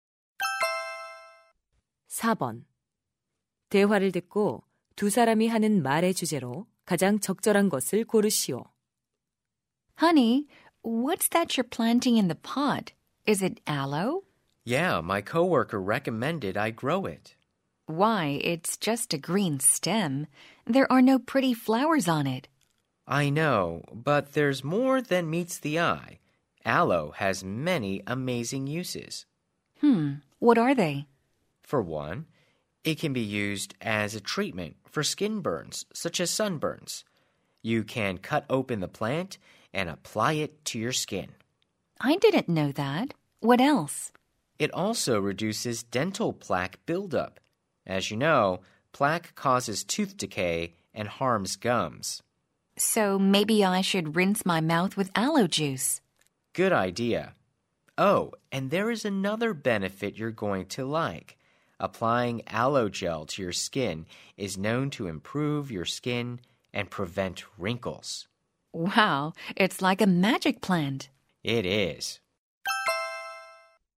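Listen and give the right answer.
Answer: 알로에의 다양한 효능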